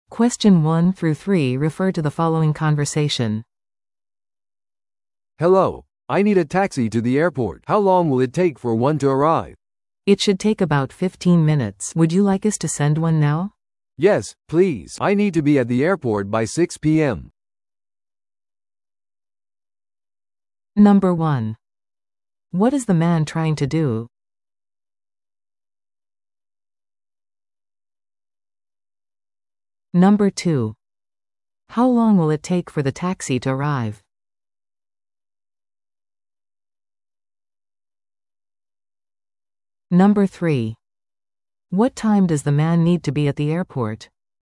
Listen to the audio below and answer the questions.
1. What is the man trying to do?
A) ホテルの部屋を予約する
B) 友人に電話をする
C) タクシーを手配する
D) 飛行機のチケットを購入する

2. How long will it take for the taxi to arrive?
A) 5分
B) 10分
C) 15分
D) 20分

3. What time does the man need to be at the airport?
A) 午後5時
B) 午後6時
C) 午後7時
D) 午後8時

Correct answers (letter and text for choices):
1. C) タクシーを手配する
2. C) 15分
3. B) 午後6時